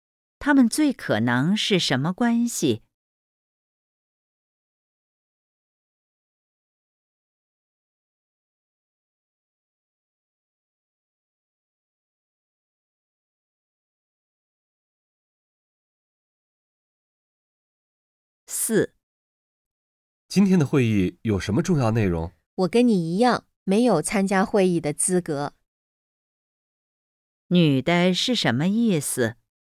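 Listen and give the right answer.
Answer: 她也没参加会议,不知道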